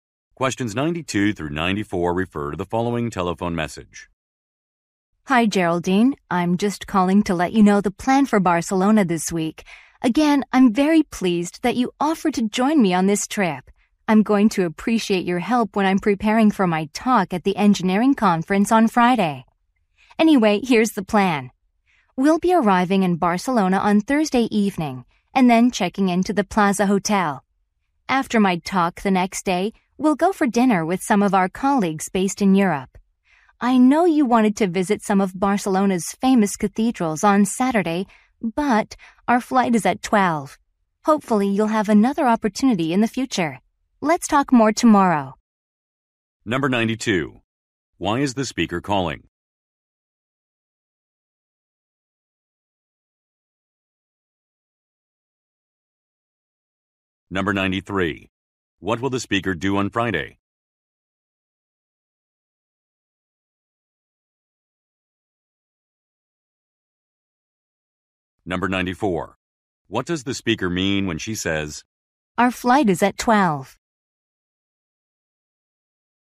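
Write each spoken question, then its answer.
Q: Why is the speaker calling?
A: To explain the plan for the Barcelona trip

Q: What will the speaker do on Friday?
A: Give a talk at an engineering conference

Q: What does the speaker mean when she says,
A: There will be no time to visit the cathedrals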